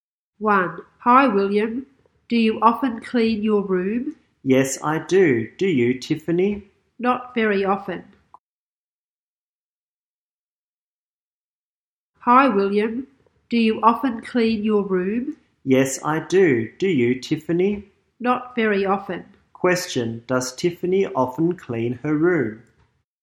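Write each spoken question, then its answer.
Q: Question, does Tiffany often clean her room?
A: No, not very often.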